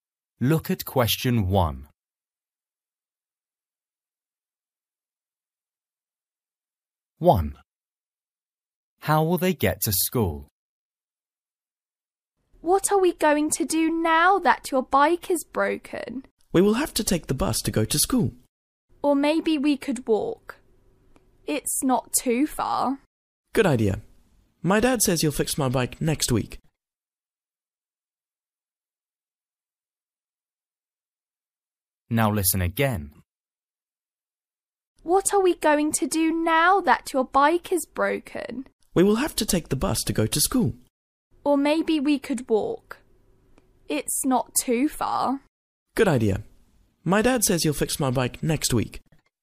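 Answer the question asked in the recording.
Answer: They will walk.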